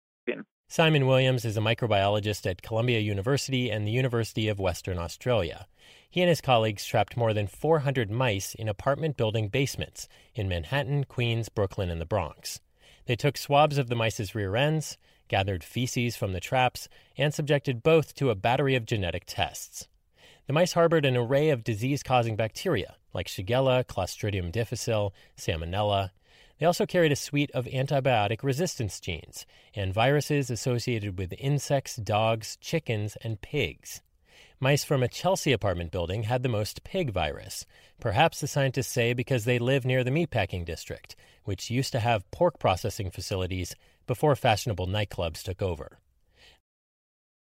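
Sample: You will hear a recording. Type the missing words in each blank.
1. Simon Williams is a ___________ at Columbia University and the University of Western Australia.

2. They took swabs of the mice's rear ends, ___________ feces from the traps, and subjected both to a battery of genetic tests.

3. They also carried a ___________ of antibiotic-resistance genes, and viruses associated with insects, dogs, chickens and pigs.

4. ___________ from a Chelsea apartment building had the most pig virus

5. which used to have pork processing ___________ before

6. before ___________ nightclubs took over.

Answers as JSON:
{"1": "microbiologist", "2": "gathered", "3": "suite", "4": "Mice", "5": "facilities", "6": "fashionable"}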